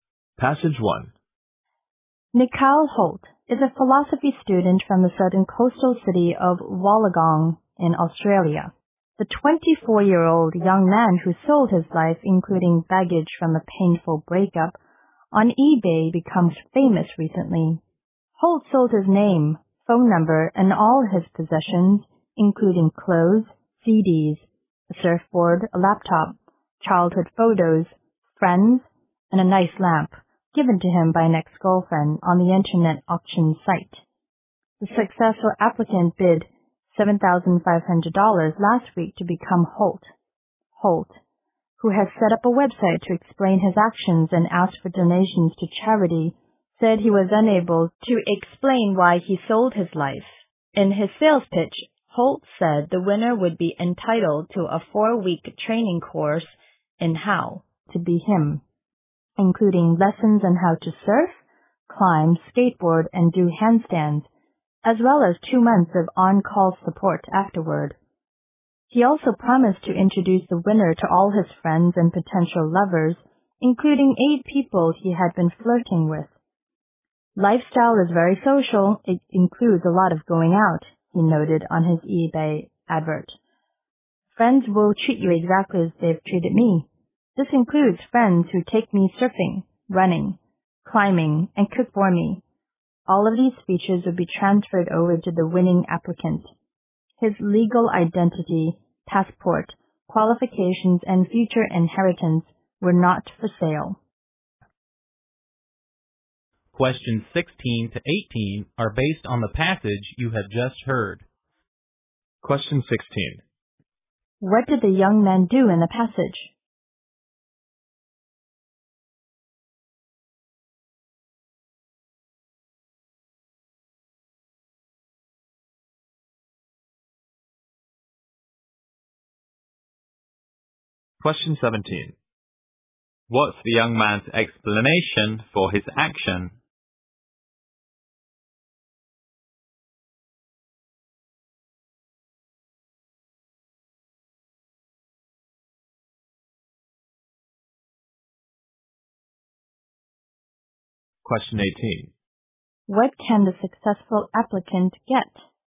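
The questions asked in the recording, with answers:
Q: What did the young man do in the passage?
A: He sold his life on eBay.

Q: What's the young man's explanation for his action?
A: He was unable to explain why.

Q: What can the successful applicant get?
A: His name, phone number, possessions, friends and a 4-week training course in how to be him.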